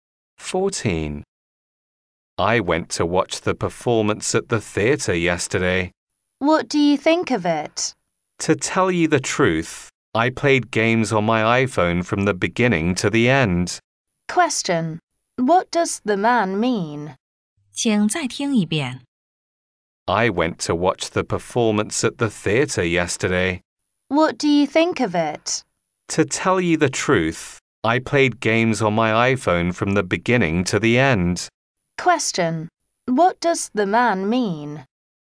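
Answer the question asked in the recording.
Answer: The performance was boring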